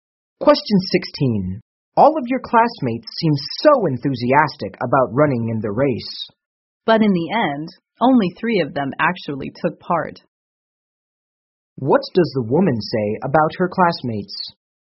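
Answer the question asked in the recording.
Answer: Only three of them actually took part in the race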